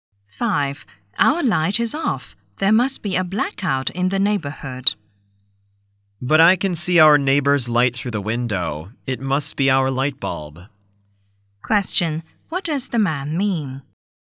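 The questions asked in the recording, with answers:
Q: What does the man mean?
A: Their light bulb is broken, not a blackout.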